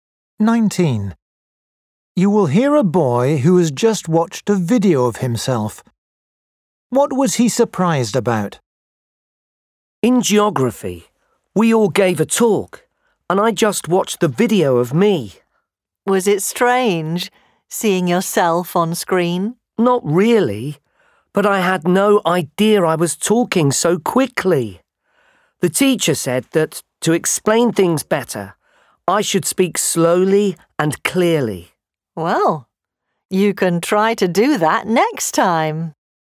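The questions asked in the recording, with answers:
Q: What was he surprised about?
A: how quickly he talked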